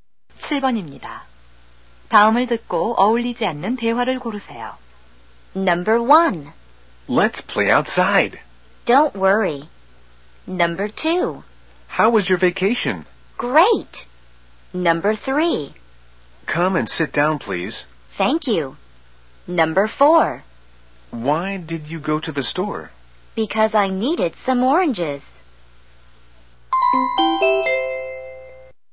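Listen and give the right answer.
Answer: 1번: Let's play outside. / Don't worry.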